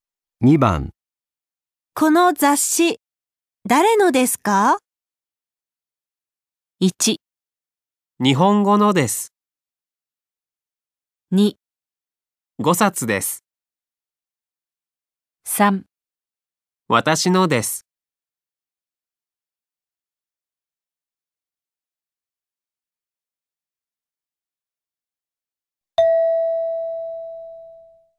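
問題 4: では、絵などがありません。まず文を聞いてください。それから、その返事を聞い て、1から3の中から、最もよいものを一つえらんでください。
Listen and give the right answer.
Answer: 私のです。

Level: N5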